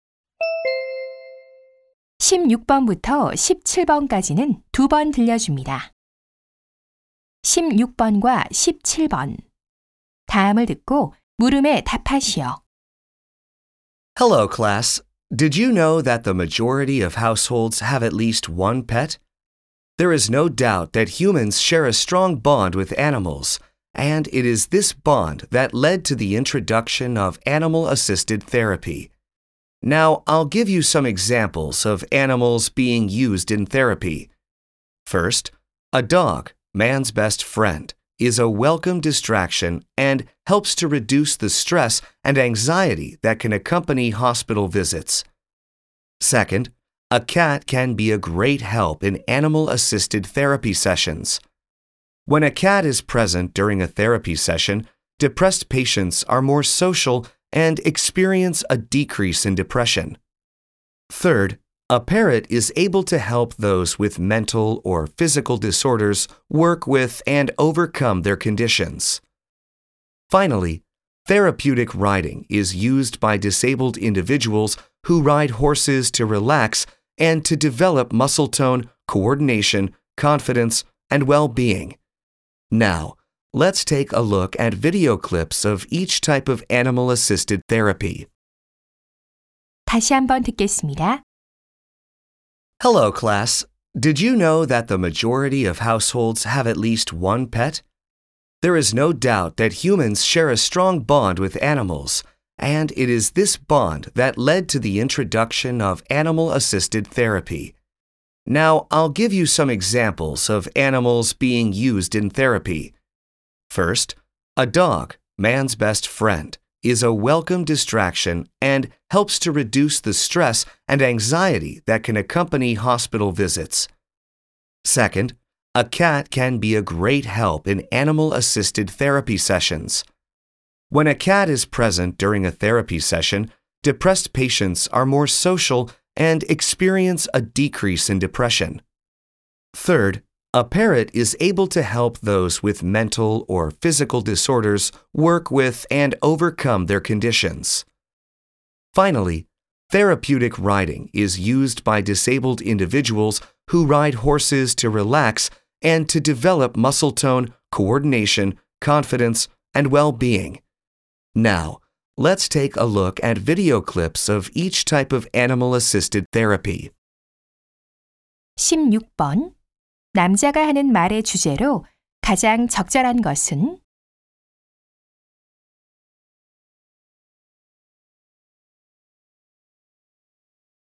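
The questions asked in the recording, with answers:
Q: 16번 남자가 하는 말의 주제로 가장 적절한 것은?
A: 치료에 활용되는 동물들의 예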